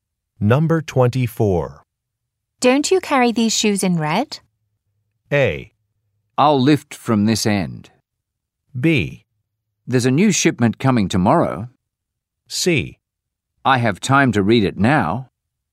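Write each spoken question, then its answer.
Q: Don't you carry these shoes in red?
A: B: There's a new shipment coming tomorrow.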